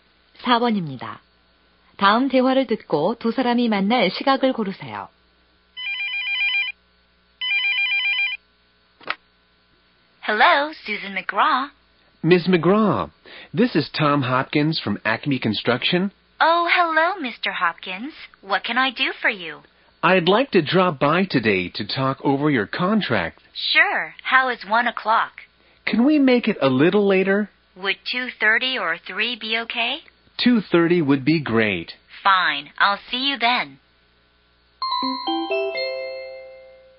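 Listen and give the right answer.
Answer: 2시 30분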